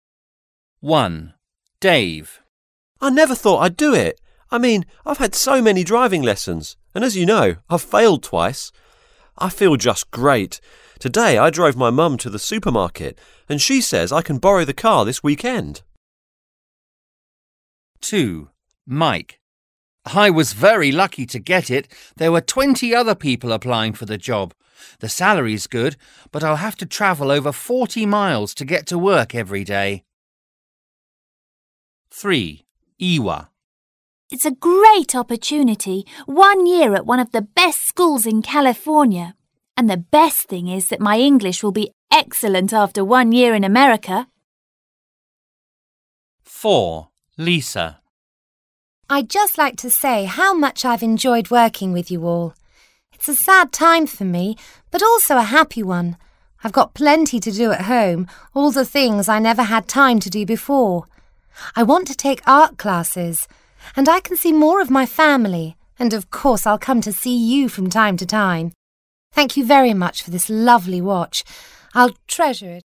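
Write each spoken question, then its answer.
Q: Listen and decide why each person is celebrating.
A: Dave passed his driving test

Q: Listen and decide why each person is celebrating.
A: Mike got a new job

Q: Listen and decide why each person is celebrating.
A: Ewa got a place to study for a year at a school in California

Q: Listen and decide why each person is celebrating.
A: Lisa is retiring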